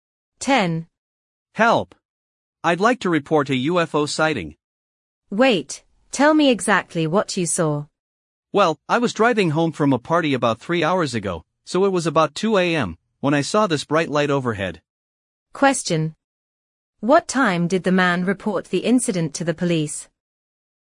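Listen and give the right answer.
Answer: About 5 a.m.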